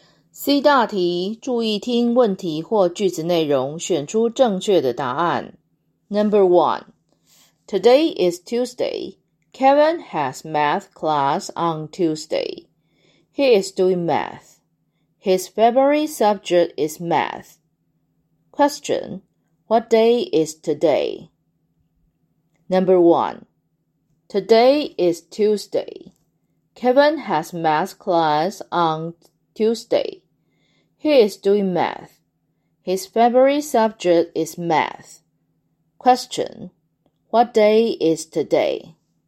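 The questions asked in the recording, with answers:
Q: What day is today?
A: Tuesday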